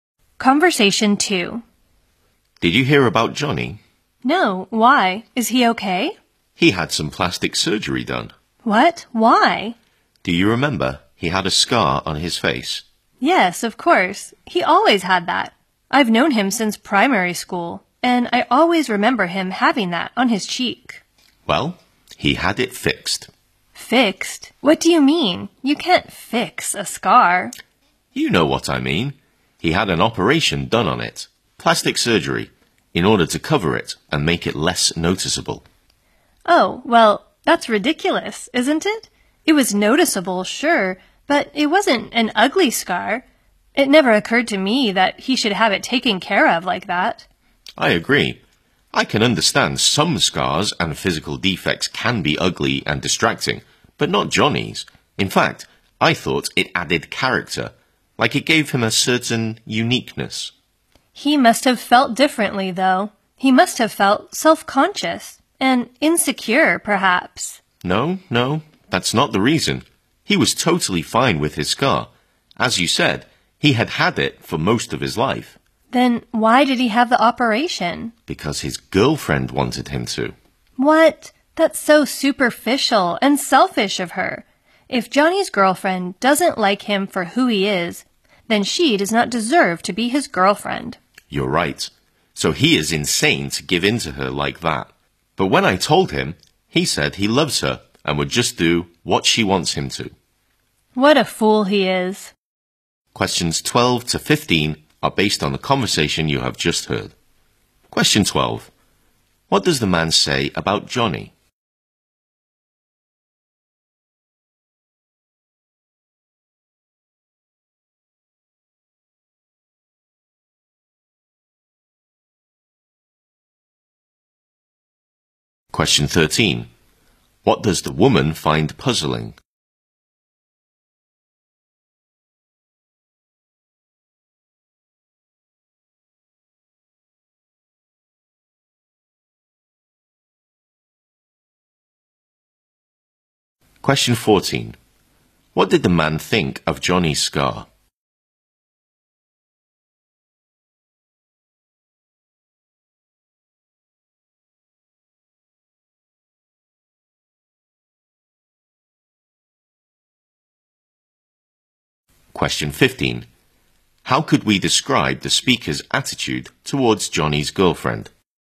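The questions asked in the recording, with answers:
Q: What does the man say about Johnny?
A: He had plastic surgery on the scar on his face.

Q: What did the man think of Johnny's scar?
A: It gave him character and made him unique.

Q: How could we describe the speaker's attitude towards Johnny's girlfriend?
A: Critical: they think she is superficial and selfish.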